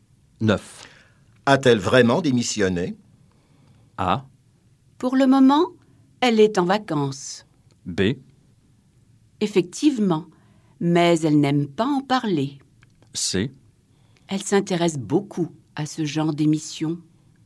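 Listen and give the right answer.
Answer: B: Effectivement, mais elle n'aime pas en parler.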